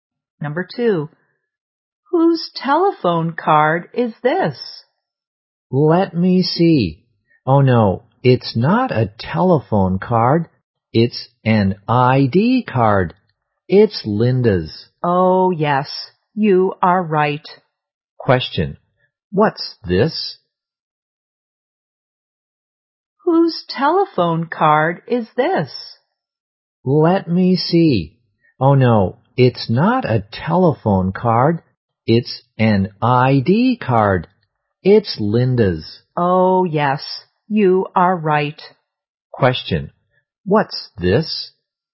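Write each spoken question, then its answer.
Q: What's this?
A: An ID card (Linda's)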